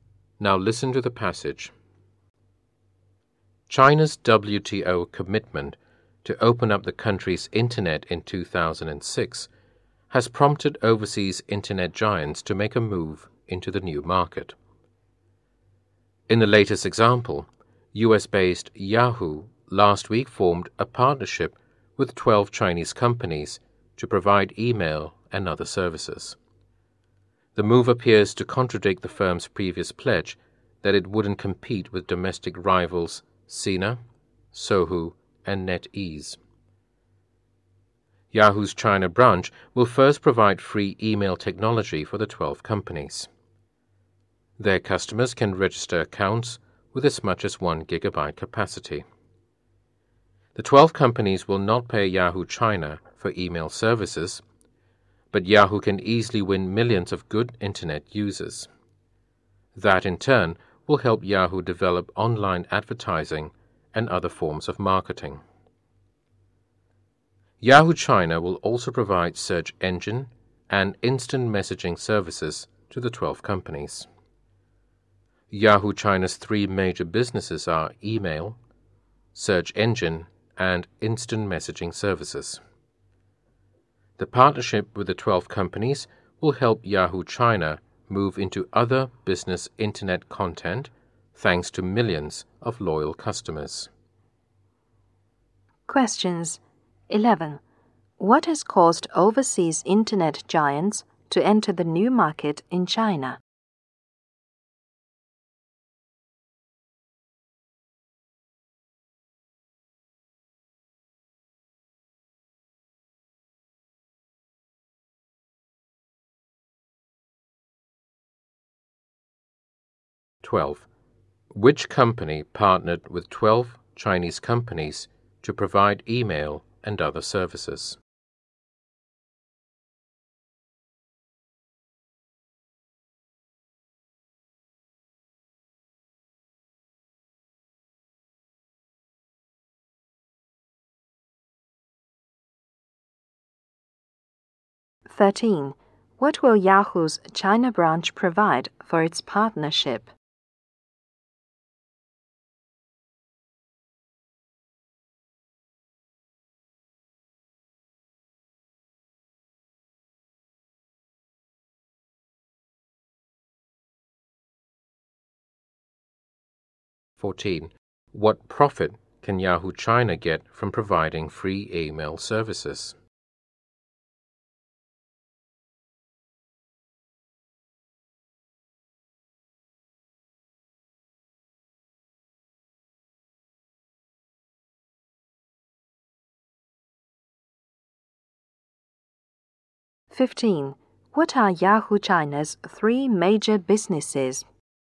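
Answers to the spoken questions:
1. China's WTO commitment
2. Yahoo
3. Free email technology
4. Millions of good internet users
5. Email, search engine, and instant messaging services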